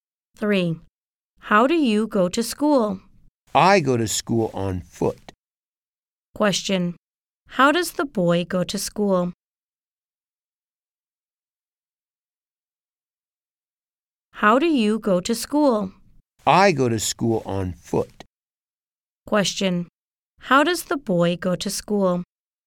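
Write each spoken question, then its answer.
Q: How does the boy go to school?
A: On foot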